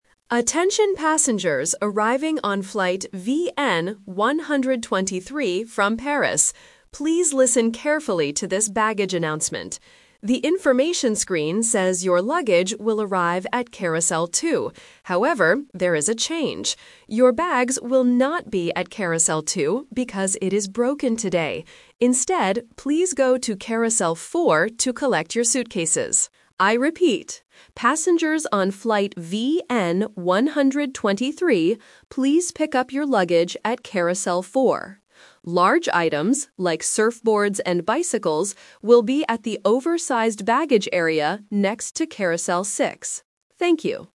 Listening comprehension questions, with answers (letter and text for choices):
Listen to the airport announcement and choose the correct answer (A, B, or C).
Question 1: Where is flight VN123 coming from?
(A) London.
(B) Paris.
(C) Tokyo.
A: (B) Paris.

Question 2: Which carousel should the passengers go to NOW?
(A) Carousel 2.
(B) Carousel 4.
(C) Carousel 6.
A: (B) Carousel 4.

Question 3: Why is Carousel 2 closed?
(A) Because it is broken.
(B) Because it is for large items.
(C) Because it is too crowded.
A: (A) Because it is broken.

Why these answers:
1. The announcer clearly states, "Attention passengers arriving on flight VN123 from Paris." Options (A) and (C) are plausible international cities but are not mentioned in the audio.
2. This question uses "The Twist". The information screen says "Carousel 2" (Option A - The Trap), but the announcer changes it. The final instruction is: "please go to Carousel 4 to collect your suitcases." Option (C) is a trap because Carousel 6 is for "large items" like surfboards, not regular suitcases.
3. The announcer gives the reason for the change clearly: "Your bags will not be at Carousel 2 because it is broken today." Option (B) is incorrect because Carousel 6 is the one for large items. Option (C) is a common problem but is never mentioned.

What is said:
Announcer: Attention passengers arriving on flight VN123 from Paris. Please listen carefully to this baggage announcement. The information screen says your luggage will arrive at Carousel 2. However, there is a change. Your bags will not be at Carousel 2 because it is broken today. Instead, please go to Carousel 4 to collect your suitcases. I repeat, passengers on flight VN123, please pick up your luggage at Carousel 4. Large items, like surfboards and bicycles, will be at the oversized baggage area next to Carousel 6. Thank you.

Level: A2